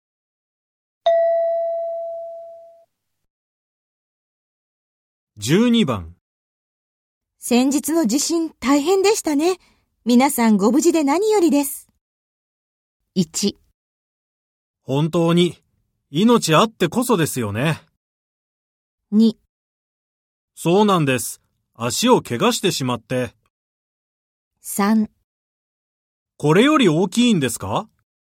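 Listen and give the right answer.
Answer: 1: 本当に命あってこそですよね。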